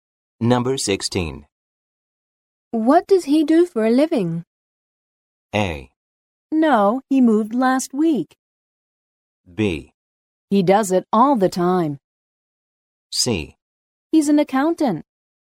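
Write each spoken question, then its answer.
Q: What does he do for a living?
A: C: He's an accountant.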